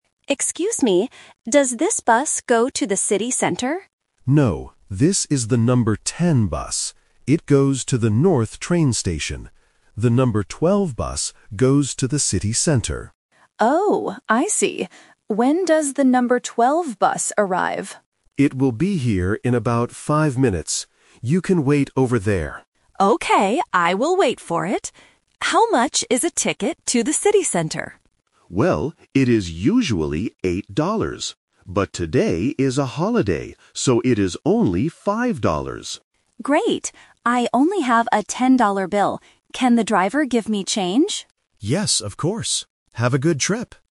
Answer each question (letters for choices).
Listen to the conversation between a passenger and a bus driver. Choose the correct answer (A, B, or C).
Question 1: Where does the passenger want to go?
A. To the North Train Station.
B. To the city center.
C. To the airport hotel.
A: B

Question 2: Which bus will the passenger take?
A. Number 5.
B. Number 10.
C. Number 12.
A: C

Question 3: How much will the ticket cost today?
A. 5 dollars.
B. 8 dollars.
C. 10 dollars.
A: A

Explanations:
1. At the beginning, the passenger asks, "does this bus go to the city center?" Option (A) is The Trap because the North Train Station is where the current bus (number 10) is going, but the passenger doesn't want to go there. Option (C) is never mentioned.
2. The driver explains that the "number 10 bus" (Option B - The Trap) goes to the train station. He tells the passenger that the "number 12 bus goes to the city center," and the passenger says, "I will wait for it." Option (A) is the price of the ticket, not the bus number.
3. This uses "The Twist". The driver says the ticket is "usually 8 dollars" (Option B - The Trap), but because it is a holiday, "it is only 5 dollars." Option (C) is the money the passenger has in his pocket ("a 10-dollar bill"), not the price of the ticket.

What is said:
Passenger: Excuse me, does this bus go to the city center?
Driver: No, this is the number 10 bus. It goes to the North Train Station. The number 12 bus goes to the city center.
Passenger: Oh, I see. When does the number 12 bus arrive?
Driver: It will be here in about five minutes. You can wait over there.
Passenger: Okay, I will wait for it. How much is a ticket to the city center?
Driver: Well, it is usually 8 dollars. But today is a holiday, so it is only 5 dollars.
Passenger: Great! I only have a 10-dollar bill. Can the driver give me change?
Driver: Yes, of course. Have a good trip!